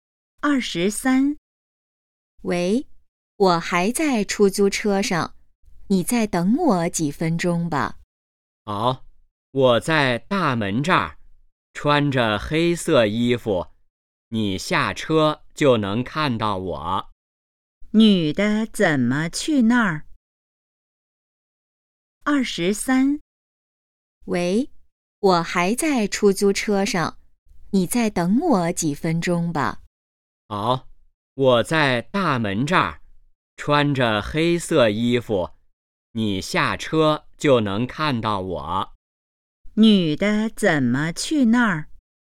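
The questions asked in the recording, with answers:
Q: 女的怎么去那儿?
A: 坐出租车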